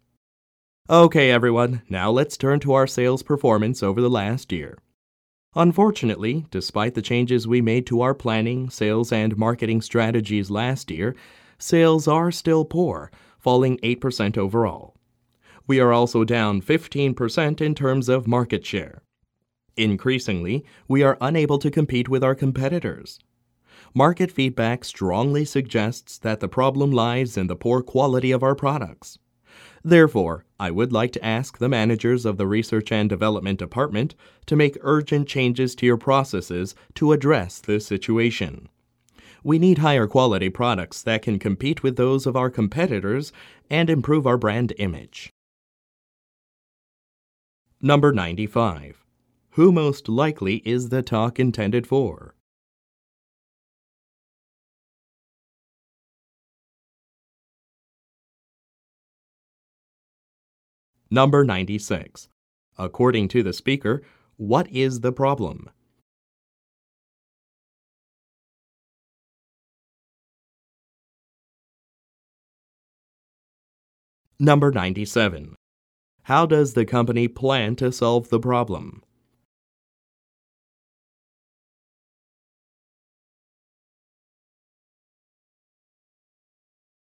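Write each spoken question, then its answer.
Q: According to the speaker, what is the problem?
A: The poor quality of the company's products

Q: How does the company plan to solve the problem?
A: By having Research and Development change its processes to make higher-quality products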